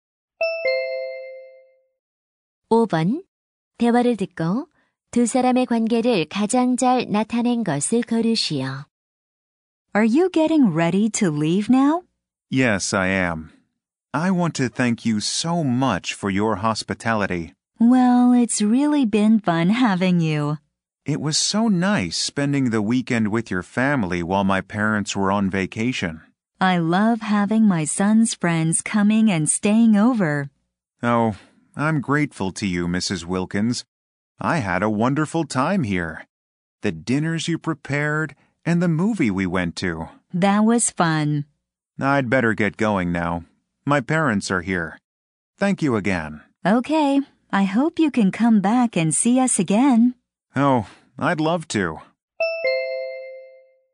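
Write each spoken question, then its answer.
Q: 대화를 듣고 두 사람의 관계를 가장 잘 나타낸 것을 고르시오.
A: 친구 어머니 - 아들의 친구(손님)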